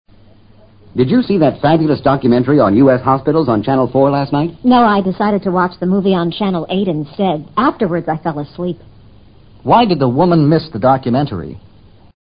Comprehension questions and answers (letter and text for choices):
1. Why did the woman miss the documentary?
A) She was at the movies.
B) She was in bed.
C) She was in the hospital.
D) She was watching another channel.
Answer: D) She was watching another channel.

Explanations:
从她说I decided to watch the movie on channel 8 可以做出回答。fabulous documentary :大型记录片。channel: 电视频道。